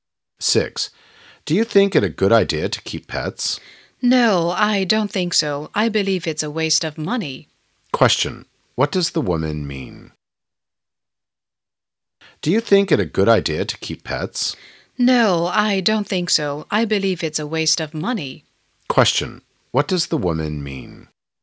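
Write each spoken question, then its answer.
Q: What does the woman mean?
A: Keeping pets isn't a good idea; it's a waste of money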